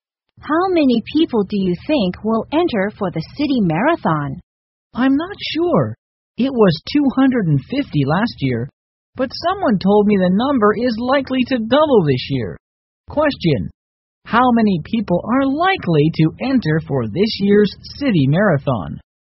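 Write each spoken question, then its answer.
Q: How many people are likely to enter for this year's city marathon?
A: 500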